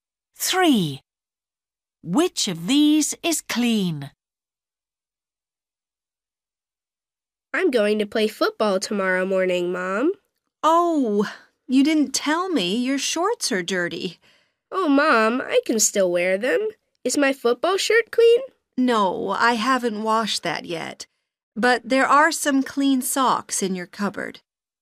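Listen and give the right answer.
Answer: socks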